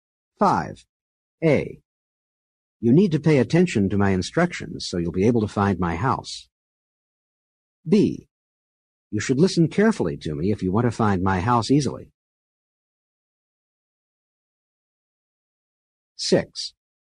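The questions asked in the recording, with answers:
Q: A. You need to pay attention to my instructions so you'll be able to find my house.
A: same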